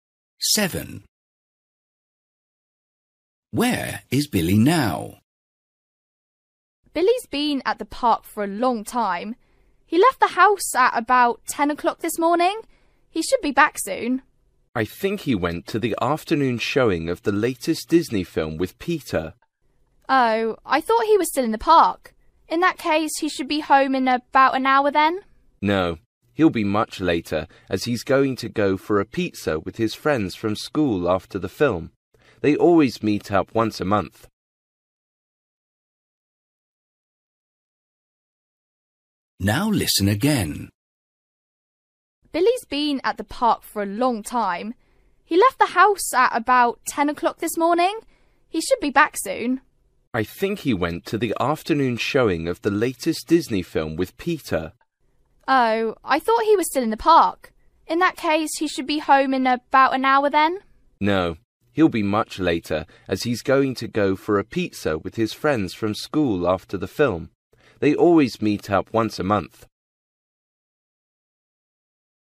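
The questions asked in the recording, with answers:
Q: Where is Billy now?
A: At the cinema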